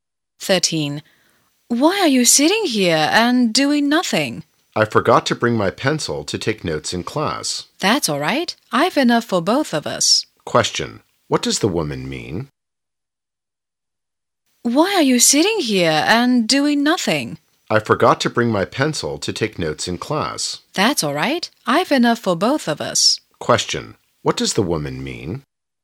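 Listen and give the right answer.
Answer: She can lend him a pencil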